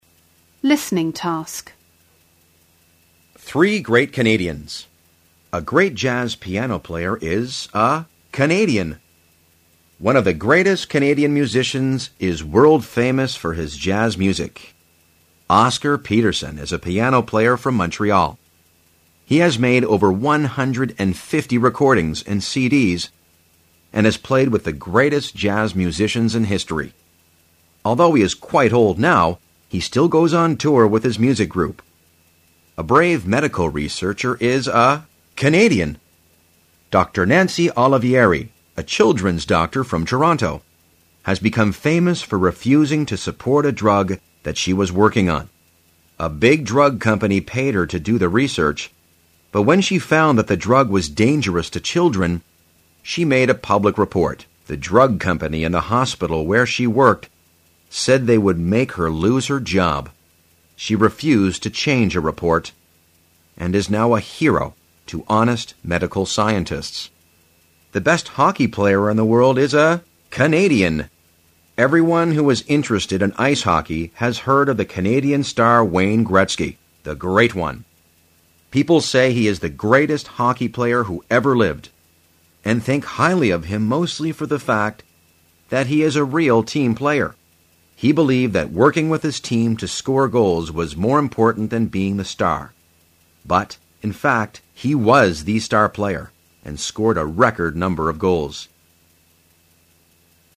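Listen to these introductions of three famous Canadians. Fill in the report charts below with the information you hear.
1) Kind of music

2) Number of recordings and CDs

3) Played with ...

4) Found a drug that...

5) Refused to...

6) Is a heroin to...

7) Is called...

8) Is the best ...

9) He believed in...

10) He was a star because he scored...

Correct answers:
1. jazz
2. over 150
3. the greatest jazz musicians in history
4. was dangerous to children
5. change her report
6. honest medical scientists
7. the Great One
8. hockey player in the world
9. working with his team to score goals
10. a record number of goals

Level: 高中英语必修三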